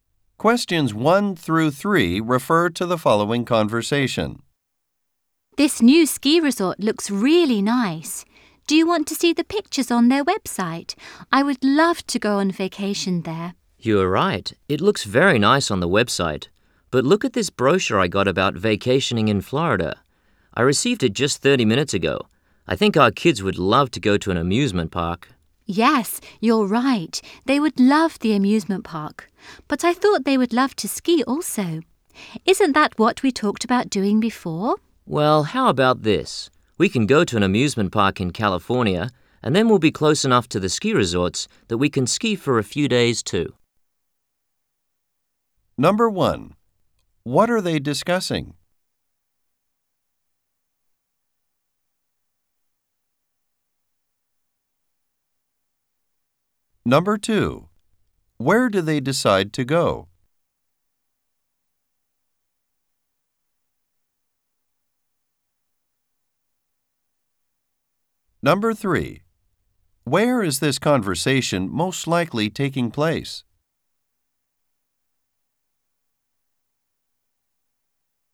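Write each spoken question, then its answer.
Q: What are they discussing?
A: Where to go on their family vacation

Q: Where do they decide to go?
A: California (an amusement park and nearby ski resorts)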